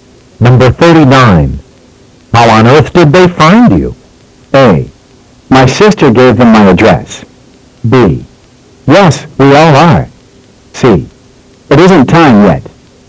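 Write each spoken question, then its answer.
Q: How on earth did they find you?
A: A: My sister gave them my address.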